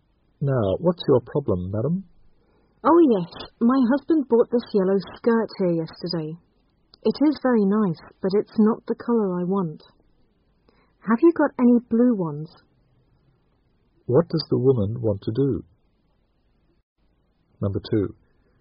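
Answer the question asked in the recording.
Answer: Exchange the yellow skirt for a blue one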